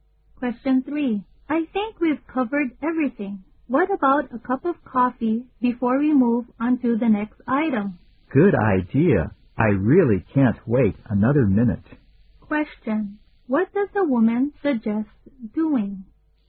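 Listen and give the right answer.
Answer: Having a cup of coffee (taking a break)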